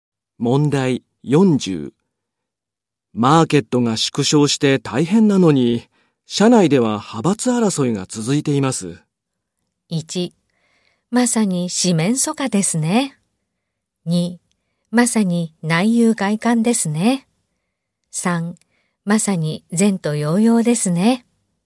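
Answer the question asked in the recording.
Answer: 2: まさに内憂外患ですね。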